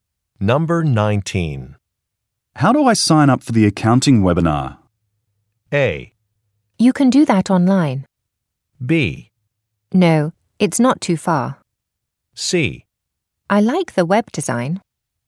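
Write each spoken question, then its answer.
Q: How do I sign up for the accounting webinar?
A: A: You can do that online.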